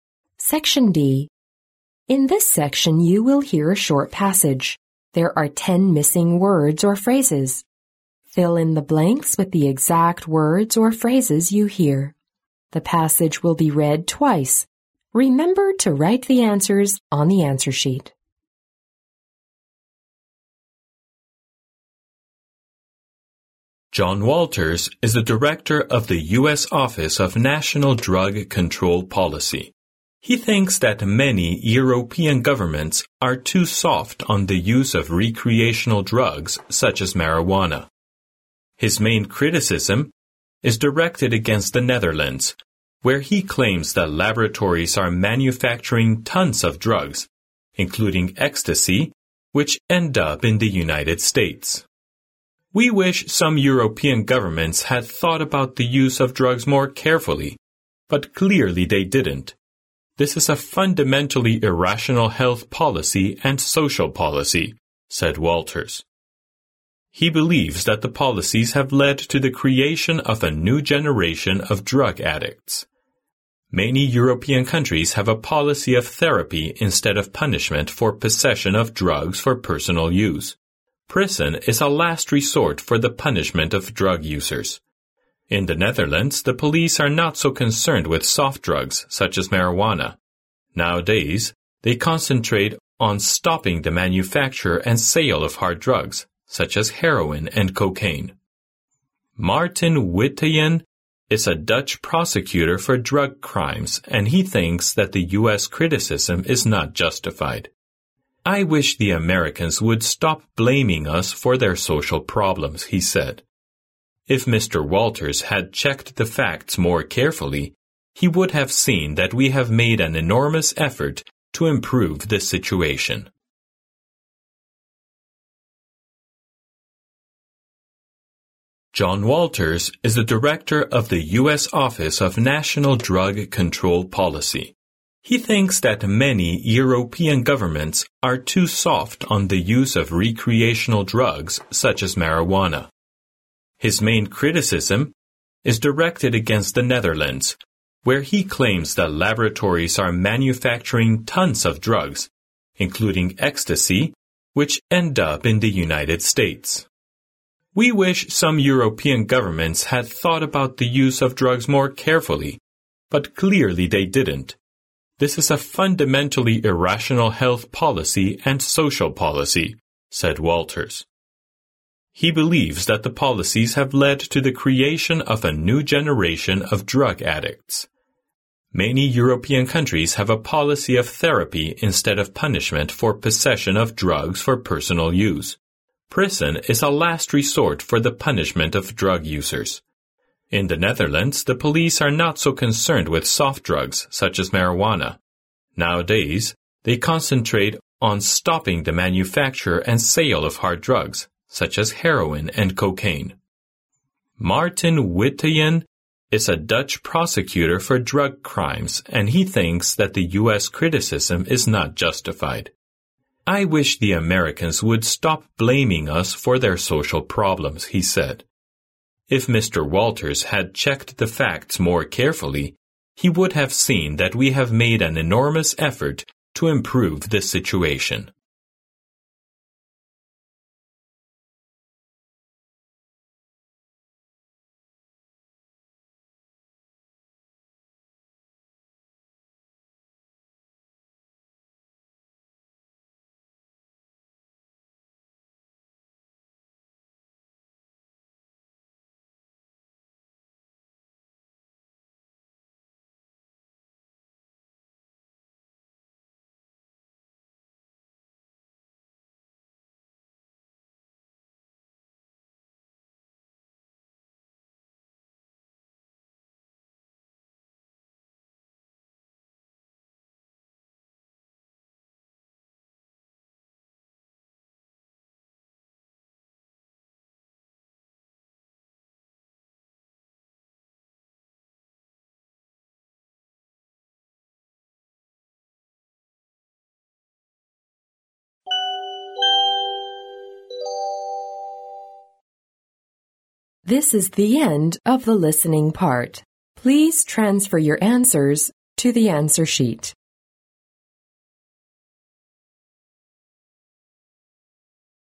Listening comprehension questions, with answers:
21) He thinks that many European governments are too soft on the use of (21) ______ drugs such as marijuana(大麻).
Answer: recreational

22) His main criticism is (22) ______ the Netherlands,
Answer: directed against

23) where he claims that laboratories are(23) ______ tons of drugs,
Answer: manufacturing

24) This is a (24) ______ irrational health policy and social policy,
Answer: fundamentally

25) He believes that the policies (25) ______the creation of a new generation of drug addicts.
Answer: have led to

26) Many European countries have a policy of therapy instead of punishment for (26) ______ of drugs for personal use.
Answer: possession

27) Prison is a last (27) ______ for the punishment of drug users.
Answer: resort

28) In the Netherlands, the police are not so (28) ______ soft drugs, such as marijuana.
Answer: concerned with

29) he thinks that the US criticism is (29) ______.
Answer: not justified

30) he would have seen that we have made (30) ______ to improve the situation.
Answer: an enormous effort

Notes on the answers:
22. 根据录音中提到的"His main criticism is directed against the Netherlands",可知John Walters的批评主要指向了荷兰,因此该空填directed against。
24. 根据录音中"This is a fundamentally irrational health policy and social policy"可知,John Walters认为从根本上来说,欧洲政府对毒品管控不严格是一种不合理的健康政策和社会政策,因此该空填fundamentally。
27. 录音中指出"Prison is a last resort for the punishment of drug users",即监狱是最后一个惩罚吸毒者的手段,因此该空填resort。
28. 录音中"In the Netherlands, the police are not so concerned with soft drugs, such as marijuana"可知,荷兰的警察对软毒品,例如大麻,并不是非常关心。因此该空填concerned with。be concerned with关心;关注。
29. 根据录音内容"Martin Witteveen is a Dutch prosecutor for drug crimes and he thinks that the US criticism is not justified"可知荷兰检察官Martin Witteveen认为美国对他们的批评是没有道理的,因此该空填not justified。

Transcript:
John Waiters is the director of the US Office of National Drug Control Policy. He thinks that many European governments are too soft on the use of recreational drugs such as marijuana.
His main criticism is directed against the Netherlands, where he claims that laboratories are manufacturing tons of drugs, including ecstasy, which end up in the United States.
"We wish some European governments had thought about the use of drugs more carefully, but clearly they didn't. This is a fundamentally irrational health policy and social policy," said Waiters. He believes that the policies have led to the creation of a new generation of drug addicts.
Many European countries have a policy of therapy instead of punishment for possession of drugs for personal use. Prison is a last resort for the punishment of drug users. In the Netherlands, the police are not so concerned with soft drugs, such as marijuana. Nowadays, they concentrate on stopping the manufacture and sale of hard drugs, such as heroin and cocaine.
Martin Witteveen is a Dutch prosecutor for drug crimes and he thinks that the US criticism is not justified. "I wish the Americans would stop blaming us for their social problems," he said. "If Mr. Waiters had checked the facts more carefully, he would have seen that we have made an enormous effort to improve the situation."